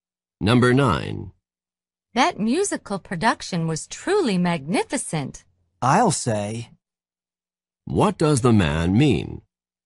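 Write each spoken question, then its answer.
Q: What does the man mean?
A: He agrees it was magnificent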